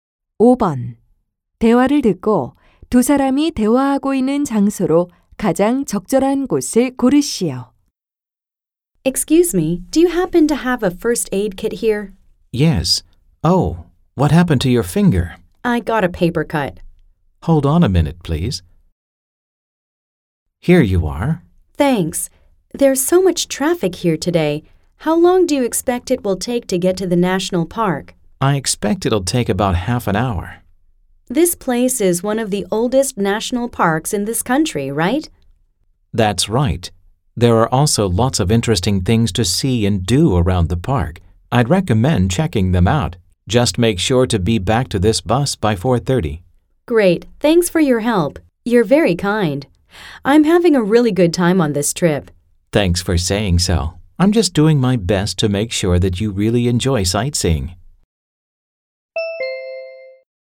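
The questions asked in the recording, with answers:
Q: 대화를 듣고 두 사람이 대화하고 있는 장소로 가장 적절한 곳을 고르시오.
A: A tour bus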